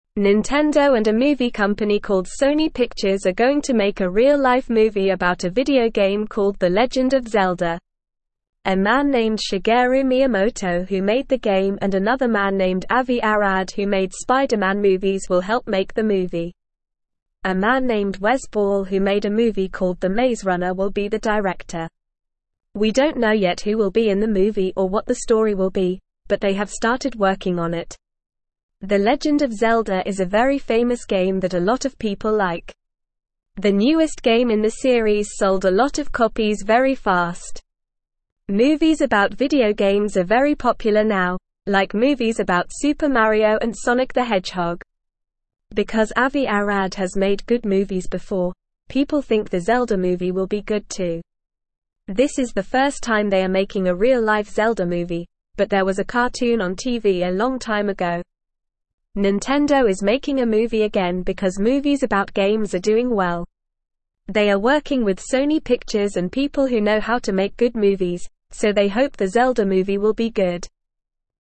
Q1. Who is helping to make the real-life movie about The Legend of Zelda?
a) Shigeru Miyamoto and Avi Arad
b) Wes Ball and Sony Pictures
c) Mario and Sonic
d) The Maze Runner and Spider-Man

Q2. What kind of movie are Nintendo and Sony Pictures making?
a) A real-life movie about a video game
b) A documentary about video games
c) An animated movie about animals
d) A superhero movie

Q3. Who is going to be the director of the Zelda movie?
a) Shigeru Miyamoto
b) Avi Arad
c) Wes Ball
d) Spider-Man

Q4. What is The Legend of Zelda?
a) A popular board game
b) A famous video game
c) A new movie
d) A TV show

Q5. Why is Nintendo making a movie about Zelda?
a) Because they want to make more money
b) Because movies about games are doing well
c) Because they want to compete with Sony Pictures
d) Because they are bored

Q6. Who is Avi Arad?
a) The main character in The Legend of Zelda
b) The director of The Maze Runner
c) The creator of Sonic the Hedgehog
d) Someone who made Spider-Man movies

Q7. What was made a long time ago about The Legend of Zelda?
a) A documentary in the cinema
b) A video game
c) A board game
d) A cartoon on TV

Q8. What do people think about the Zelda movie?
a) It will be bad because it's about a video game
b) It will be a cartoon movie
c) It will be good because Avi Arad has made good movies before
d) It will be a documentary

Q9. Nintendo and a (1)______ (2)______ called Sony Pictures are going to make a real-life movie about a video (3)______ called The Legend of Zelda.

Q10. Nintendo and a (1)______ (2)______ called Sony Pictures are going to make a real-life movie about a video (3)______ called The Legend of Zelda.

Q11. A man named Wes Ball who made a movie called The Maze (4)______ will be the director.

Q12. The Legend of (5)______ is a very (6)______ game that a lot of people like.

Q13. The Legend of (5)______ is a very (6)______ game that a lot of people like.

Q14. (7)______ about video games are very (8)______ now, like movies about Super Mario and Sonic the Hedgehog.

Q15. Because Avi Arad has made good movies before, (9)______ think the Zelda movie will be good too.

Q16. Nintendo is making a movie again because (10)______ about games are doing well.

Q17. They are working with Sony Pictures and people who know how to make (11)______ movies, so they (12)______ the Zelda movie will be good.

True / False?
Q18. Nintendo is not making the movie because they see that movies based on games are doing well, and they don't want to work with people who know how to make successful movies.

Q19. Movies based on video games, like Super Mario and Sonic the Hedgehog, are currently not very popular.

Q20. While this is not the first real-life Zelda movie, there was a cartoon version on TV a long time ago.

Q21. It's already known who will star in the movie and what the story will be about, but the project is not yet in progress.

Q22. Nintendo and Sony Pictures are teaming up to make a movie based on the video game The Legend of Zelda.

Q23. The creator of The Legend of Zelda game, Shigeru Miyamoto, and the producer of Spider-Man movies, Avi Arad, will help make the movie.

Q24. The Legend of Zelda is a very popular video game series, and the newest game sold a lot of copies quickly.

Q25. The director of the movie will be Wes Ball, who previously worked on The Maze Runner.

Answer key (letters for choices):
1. a
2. a
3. c
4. b
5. b
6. d
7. d
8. c
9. company
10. game
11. Runner
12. Zelda
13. famous
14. popular
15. people
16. movies
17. hope
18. False
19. False
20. False
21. False
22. True
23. True
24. True
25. True

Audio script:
Nintendo and a movie company called Sony Pictures are going to make a real-life movie about a video game called The Legend of Zelda. A man named Shigeru Miyamoto who made the game and another man named Avi Arad who made Spider-Man movies will help make the movie. A man named Wes Ball who made a movie called The Maze Runner will be the director. We don't know yet who will be in the movie or what the story will be, but they have started working on it.
The Legend of Zelda is a very famous game that a lot of people like. The newest game in the series sold a lot of copies very fast. Movies about video games are very popular now, like movies about Super Mario and Sonic the Hedgehog. Because Avi Arad has made good movies before, people think the Zelda movie will be good too.
This is the first time they are making a real-life Zelda movie, but there was a cartoon on TV a long time ago. Nintendo is making a movie again because movies about games are doing well. They are working with Sony Pictures and people who know how to make good movies, so they hope the Zelda movie will be good.

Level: Level 2